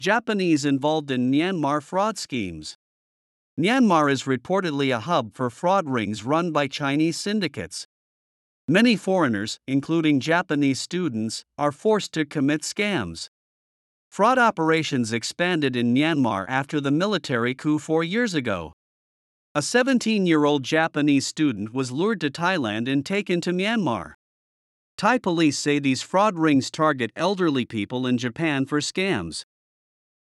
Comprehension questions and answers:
英語ニュースの音声を聞き、各空欄に入る英文を正確に書き取ってください。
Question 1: Myanmar is ( ) run by Chinese syndicates.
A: reportedly a hub for fraud rings

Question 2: Many foreigners, including Japanese students, ( ).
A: are forced to commit scams

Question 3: Fraud operations expanded in Myanmar ( ).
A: after the military coup four years ago

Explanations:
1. 「fraud(詐欺)」という単語そのものを知らなかった人と、「fraud rings」という表現に馴染みがなかった人がいたようです。ニュース英語に触れながら語彙を増やしていきましょう。
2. 「強制的に〜させられている」という意味なので、文法的に受け身の過去分詞「forced」にしないと意味が通りません。 「forced」の語尾の子音[d]は止める音でほとんど聞こえません。
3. 「coup」 とはフランス語由来の単語です。語尾の「p」を読まずに [kúː] と発音するので注意しましょう。

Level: 中級脱出